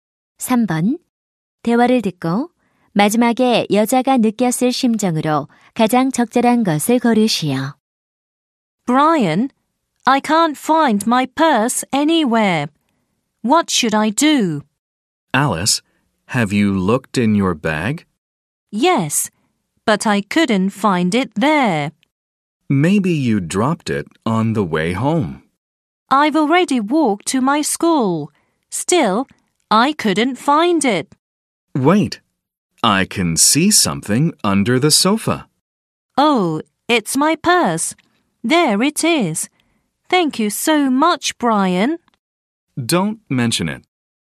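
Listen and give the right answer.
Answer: 안도함, 고마움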